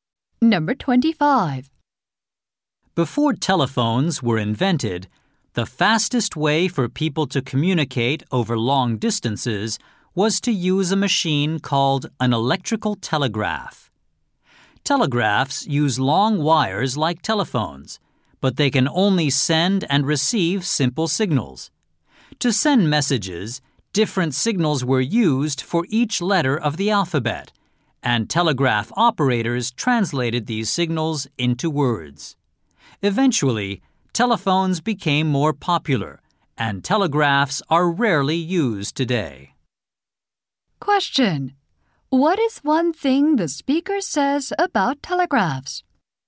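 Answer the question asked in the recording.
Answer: They can send only simple signals and are rarely used today.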